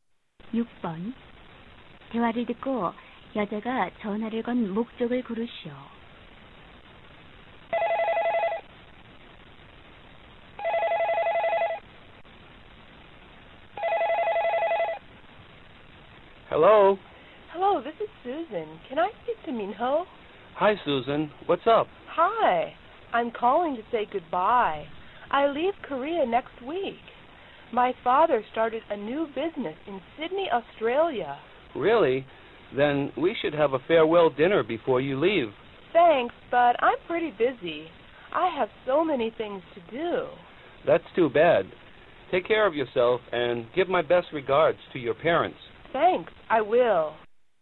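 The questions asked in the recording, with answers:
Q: 대화를 듣고 여자가 전화를 건 목적을 고르시오.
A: 작별 인사를 하려고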